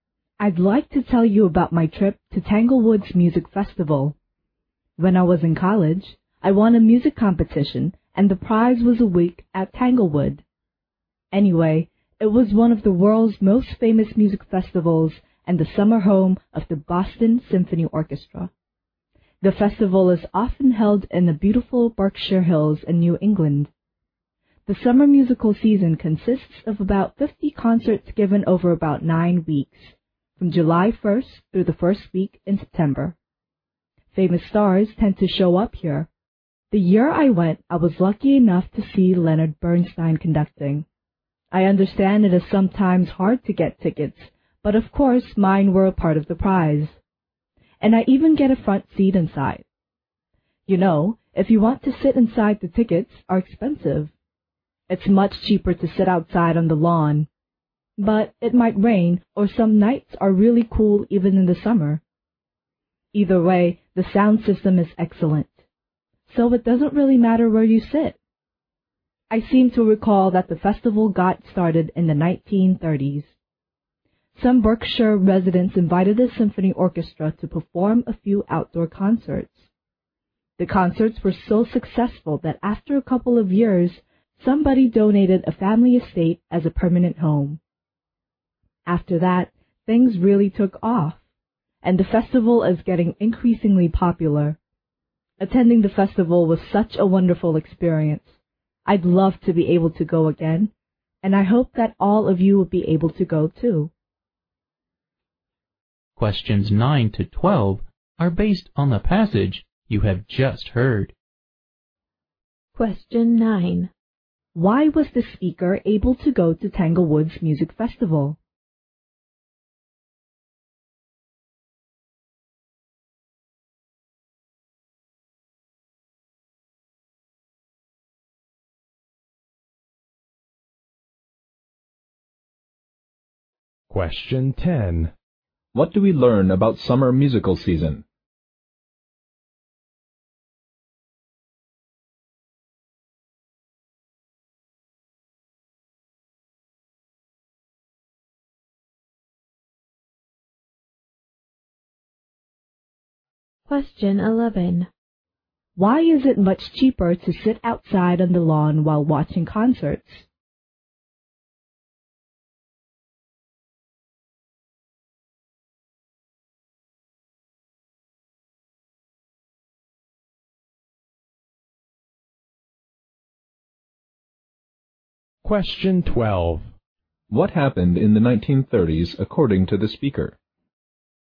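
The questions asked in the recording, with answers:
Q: Why was the speaker able to go to Tanglewood's Music Festival?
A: She won a music competition and the prize was a week there.

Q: What do we learn about summer musical season?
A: About 50 concerts are given over about 9 weeks, from July 1st to the first week of September.

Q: What happened in the 1930s according to the speaker?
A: Some Berkshire residents invited the symphony orchestra to perform a few outdoor concerts.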